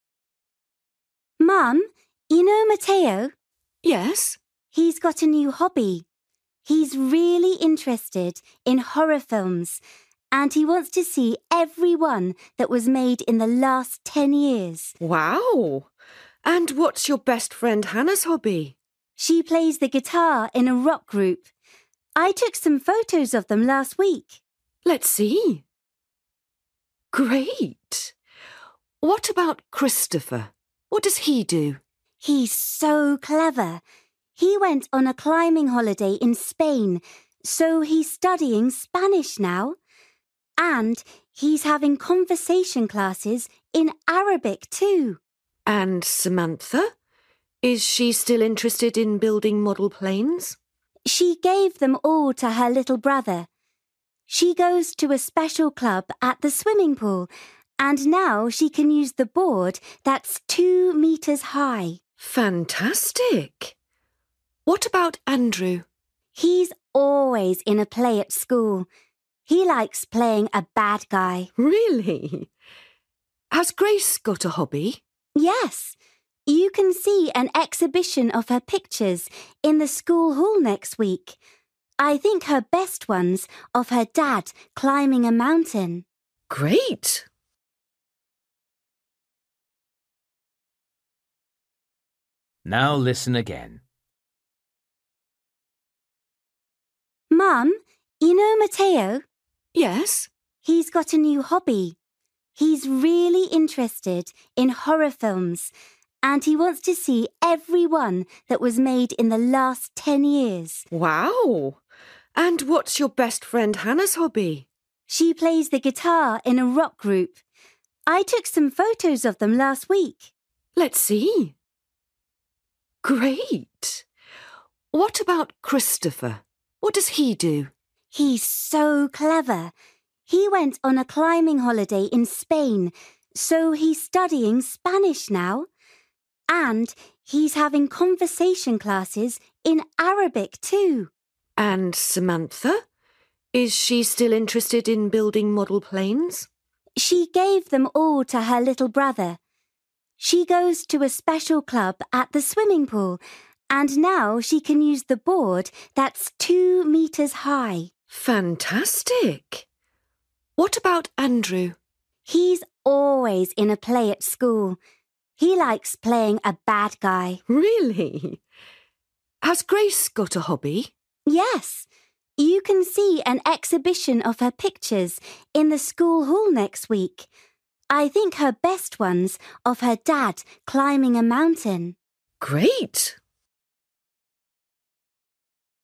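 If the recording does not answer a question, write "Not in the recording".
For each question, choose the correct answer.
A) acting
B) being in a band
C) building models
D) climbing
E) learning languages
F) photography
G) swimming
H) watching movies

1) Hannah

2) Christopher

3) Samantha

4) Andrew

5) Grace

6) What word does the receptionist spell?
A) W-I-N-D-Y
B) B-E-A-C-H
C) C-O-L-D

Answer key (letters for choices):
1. B
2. E
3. G
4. A
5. F
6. Not in the recording

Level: Luyện nghe trình độ A2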